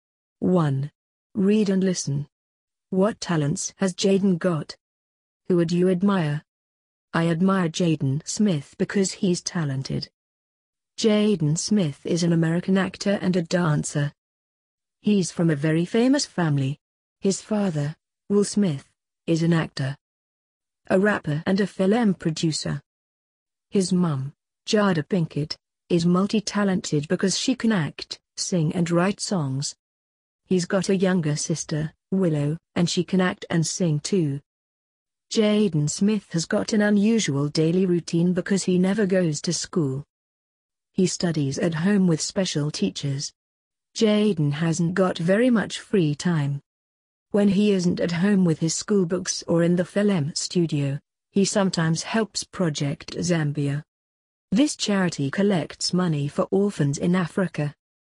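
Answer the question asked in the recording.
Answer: He can act and dance (he's an actor and a dancer).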